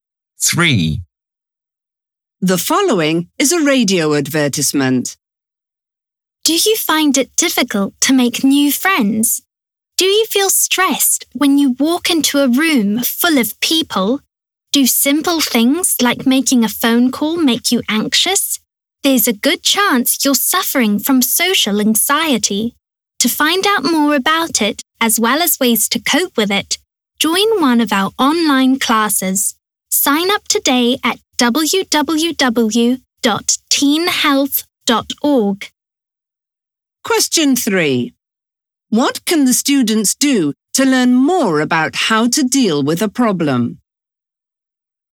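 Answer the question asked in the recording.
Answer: Join an online class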